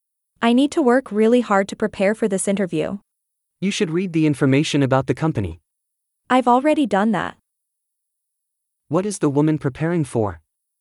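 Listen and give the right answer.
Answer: An interview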